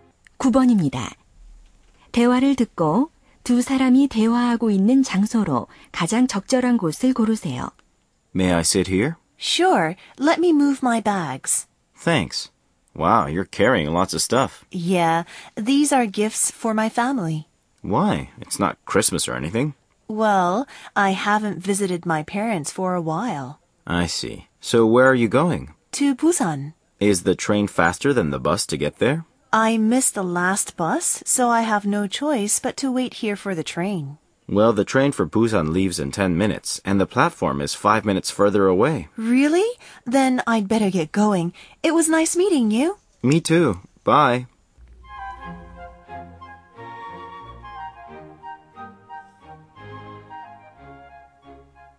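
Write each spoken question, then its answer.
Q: 대화를 듣고 두 사람이 대화하고 있는 장소로 가장 적절한 곳을 고르세요.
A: 기차역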